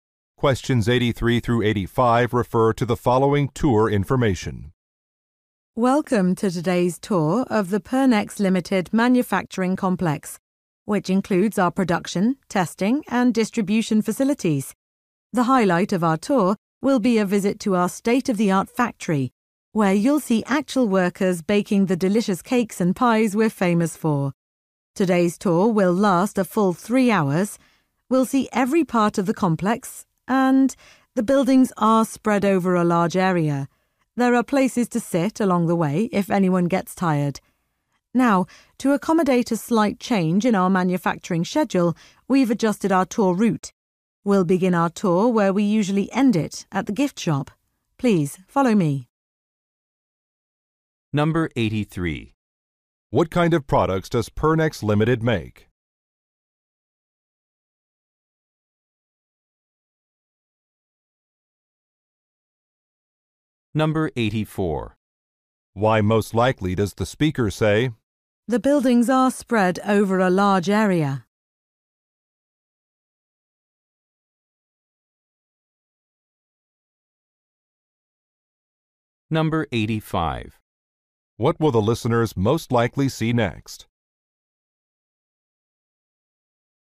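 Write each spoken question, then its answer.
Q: What kind of products does Pernex Limited make?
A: Baked goods (cakes and pies)

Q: What will the listeners most likely see next?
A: The gift shop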